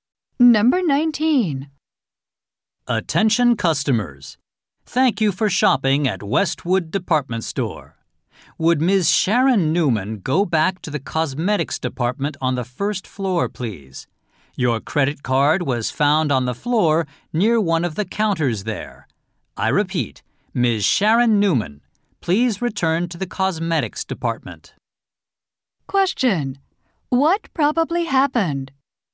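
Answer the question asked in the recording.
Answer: Sharon Newman dropped her credit card in the cosmetics department.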